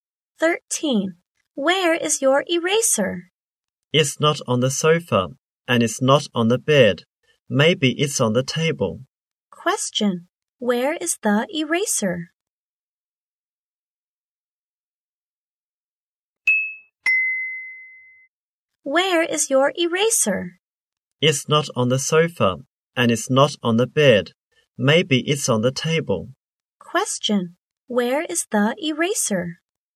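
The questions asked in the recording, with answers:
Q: Where is the eraser?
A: Maybe on the table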